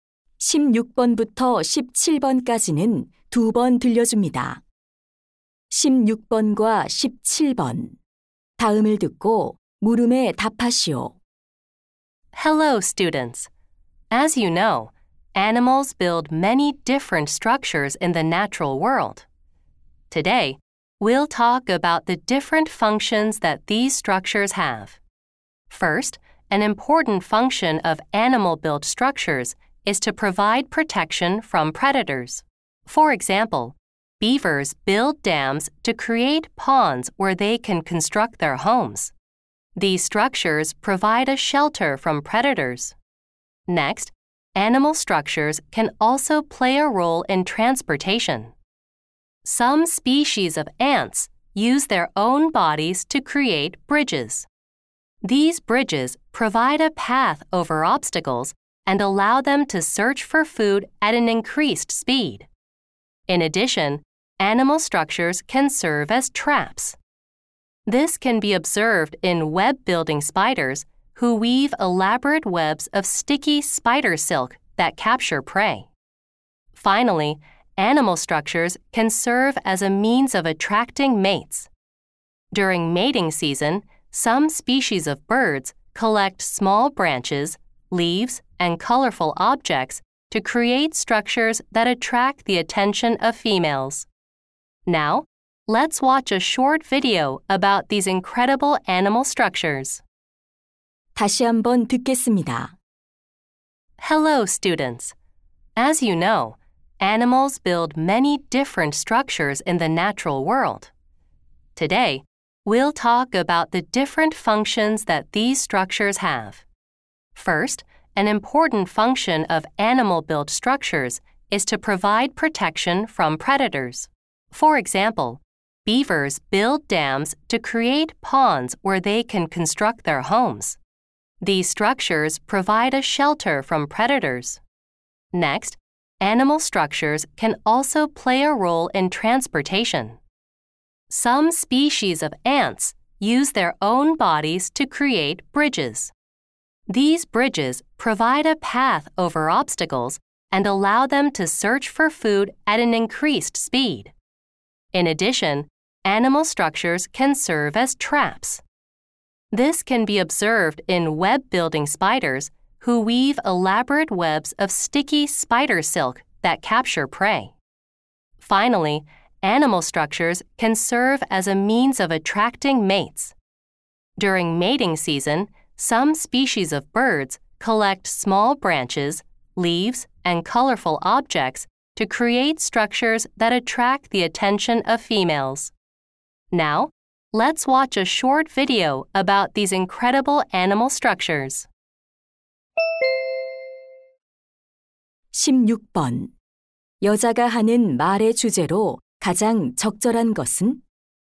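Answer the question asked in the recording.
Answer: 동물이 만든 구조물의 다양한 기능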